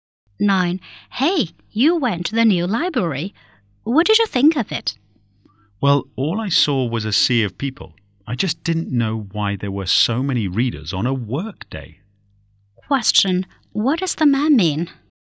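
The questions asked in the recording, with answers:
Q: What does the man mean?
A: The new library was very crowded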